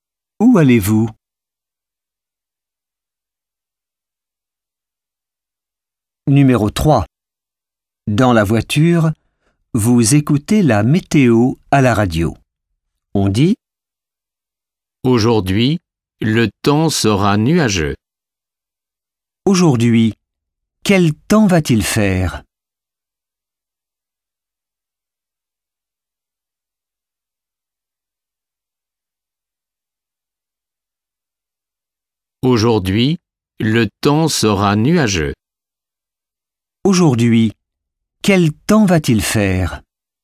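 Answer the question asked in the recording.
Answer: Le temps sera nuageux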